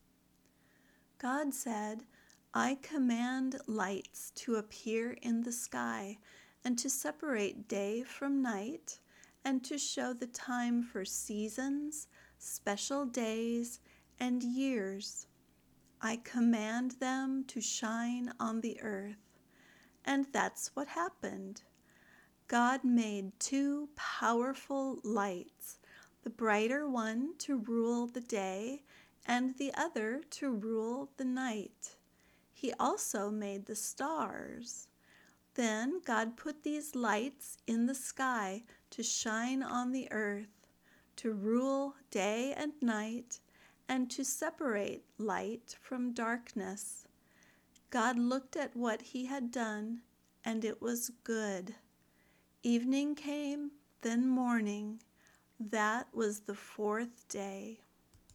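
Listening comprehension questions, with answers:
Find the answers to these three questions as you listen:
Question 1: Where did the lights appear?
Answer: In the sky

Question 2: Give three reasons God put these lights in the sky.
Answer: To shine on the earth, to rule day and night, and to separate light from darkness

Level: Beginner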